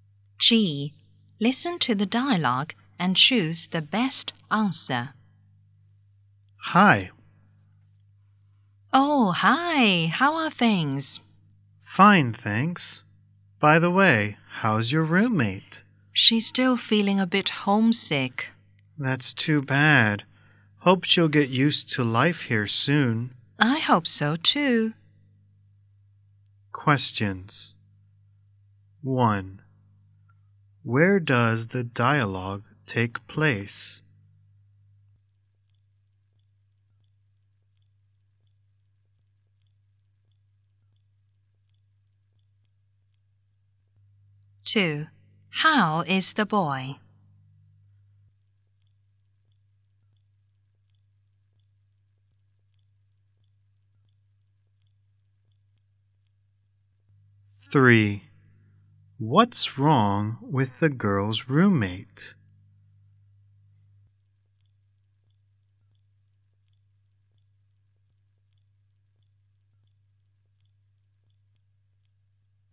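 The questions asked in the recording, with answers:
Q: What's wrong with the girl's roommate?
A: She's still feeling a bit homesick.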